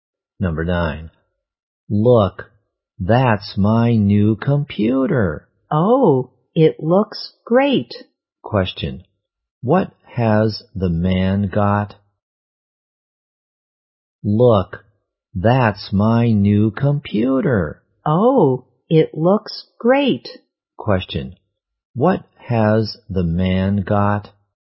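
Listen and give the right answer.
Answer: A new computer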